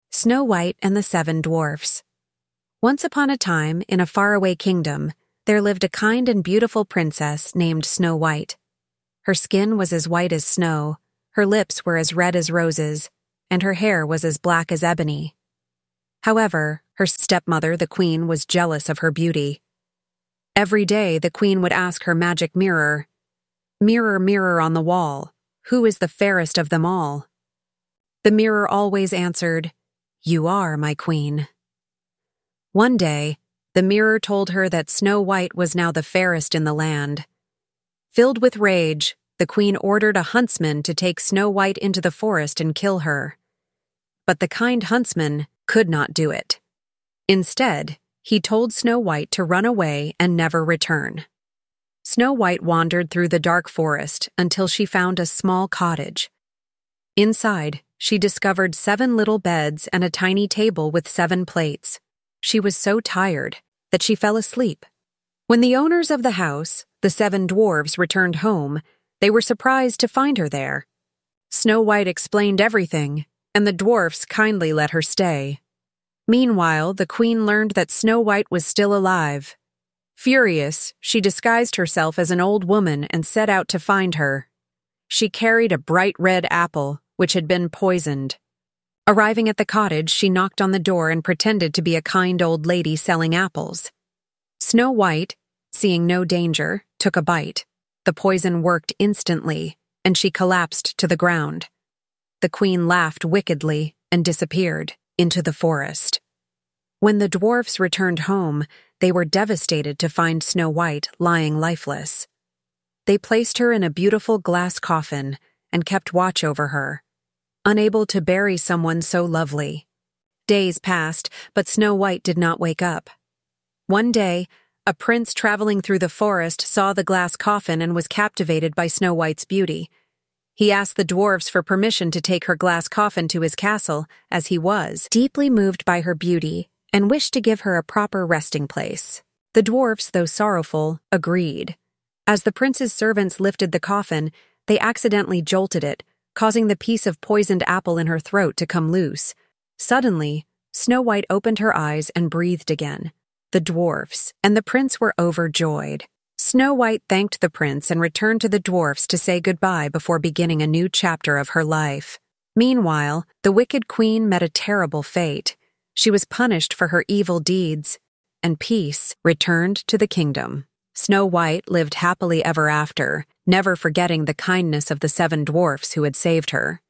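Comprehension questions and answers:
2. Second Listening (Details): Play the audio again. This time, students listen for specific information. Show them the following questions to answer.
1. What color was Snow White's skin?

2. Why was the Queen angry?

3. What did the queen do to Snow White?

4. Who helped Snow White?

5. What happened to Snow White and the queen at last?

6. What is the main idea of the text?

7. Why is the Queen jealous of Snow White?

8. Where does Snow White find refuge after fleeing from the huntsman?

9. What does the huntsman do instead of harming Snow White?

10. Which of the following best describes the Queen's personality?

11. What object does the Queen use to poison Snow White?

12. Which word from the story most nearly means "filled with intense anger"?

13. What can be inferred about the dwarfs' feelings towards Snow White after she stays with them?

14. 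Which of the following best summarizes the ending of the Snow White story?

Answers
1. White, as white as snow
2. The mirror told her Snow White was now the fairest in the land
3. She ordered a huntsman to kill her, then poisoned her with an apple
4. The huntsman, the seven dwarfs and the prince
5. Snow White woke up and lived happily ever after; the queen was punished
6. A jealous queen tries to kill Snow White, but she is saved and lives happily
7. Because of her beauty; the mirror said she was the fairest
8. In the seven dwarfs' small cottage in the forest
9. He tells her to run away and never return
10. Jealous and wicked
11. A red apple
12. Furious
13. They cared about and loved her
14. Snow White wakes up and lives happily ever after, and the queen is punished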